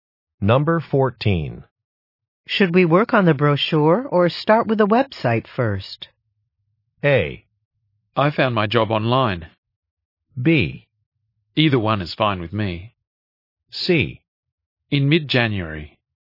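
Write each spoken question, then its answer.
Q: Should we work on the brochure or start with the website first?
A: B: Either one is fine with me.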